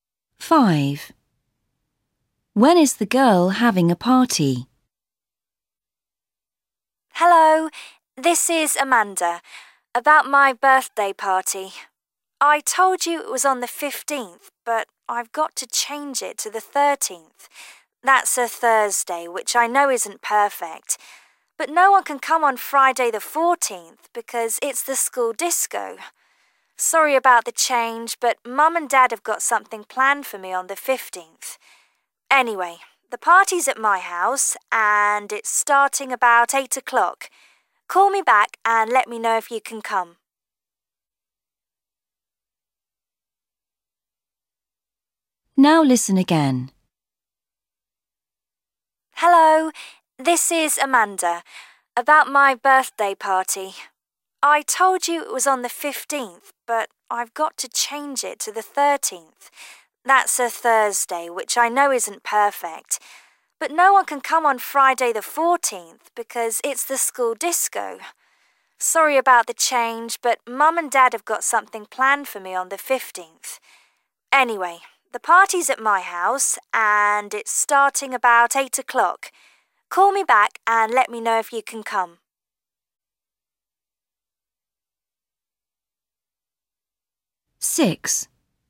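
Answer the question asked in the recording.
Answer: Thursday the 13th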